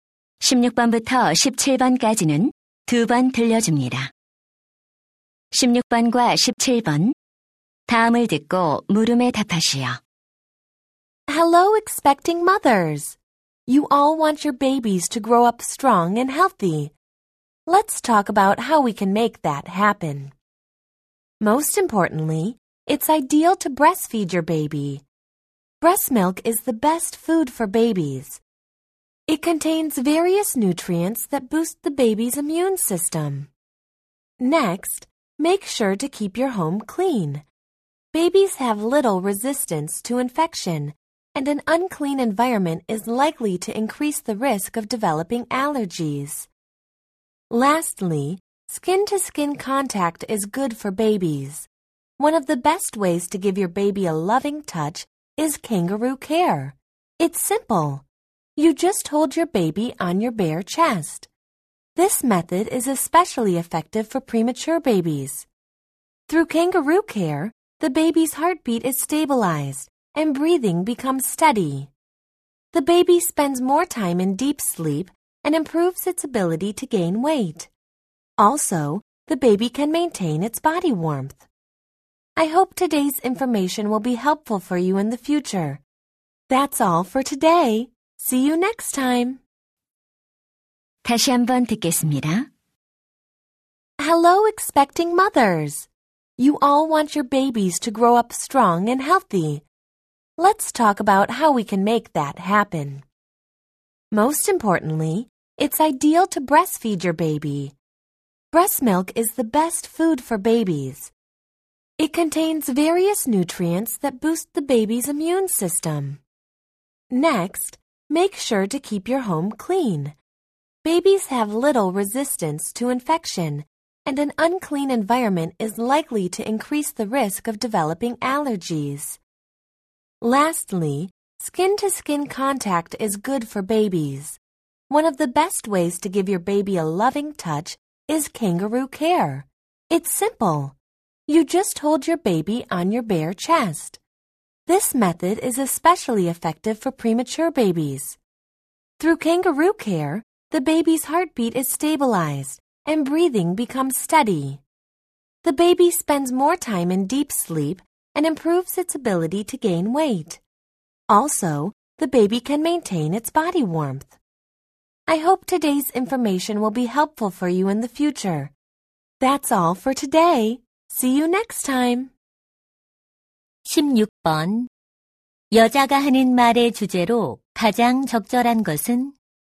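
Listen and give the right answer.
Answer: 아기를 건강하게 키우는 방법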